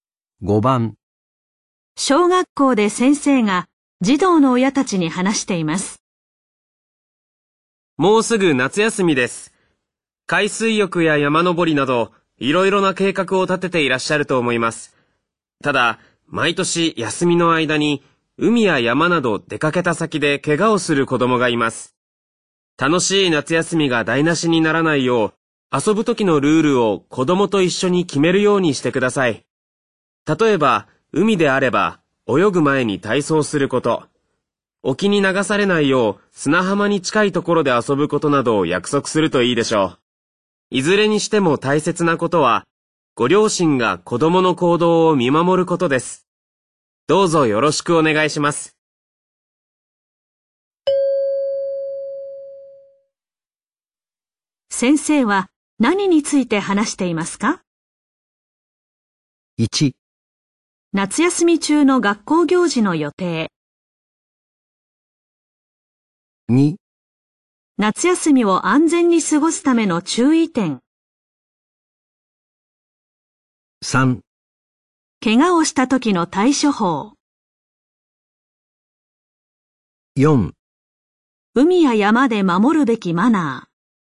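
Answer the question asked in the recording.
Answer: 2: 夏休みを安全に過ごすための注意点。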